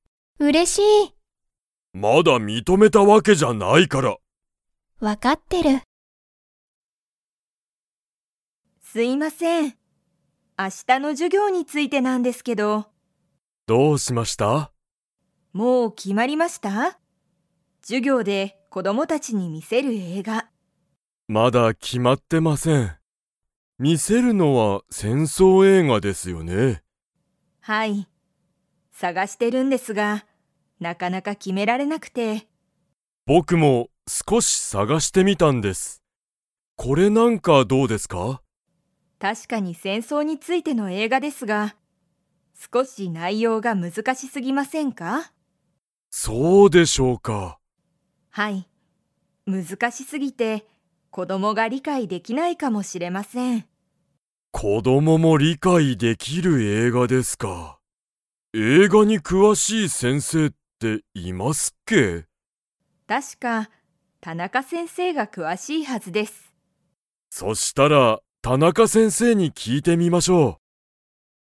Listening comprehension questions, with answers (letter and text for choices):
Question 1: 先生(せんせい)は、授業(じゅぎょう)で子供(こども)たちに についての映画(えいが)を見(み)せる。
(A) 料理(りょうり)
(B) 動物(どうぶつ)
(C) 戦争(せんそう)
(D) 家族(かぞく)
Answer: (C) 戦争(せんそう)

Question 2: 田中(たなか)先生(せんせい)は、映画(えいが)に詳(くわ)しいはずですか?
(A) はい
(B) いいえ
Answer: (A) はい

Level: Level 3